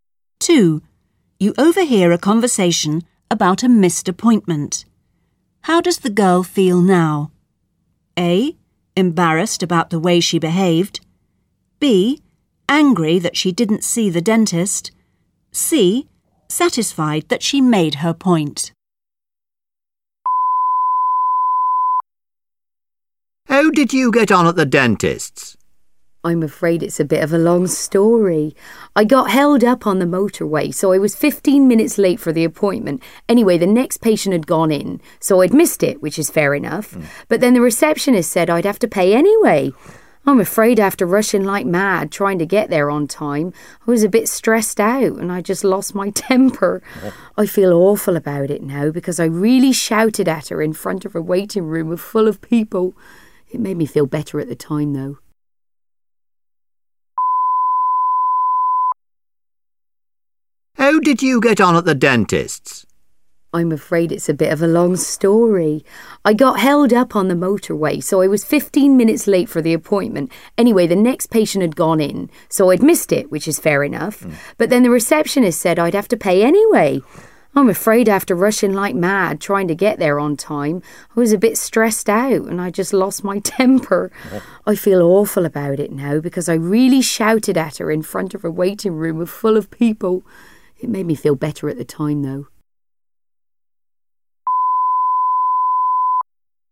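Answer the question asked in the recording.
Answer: A: Embarrassed about the way she behaved.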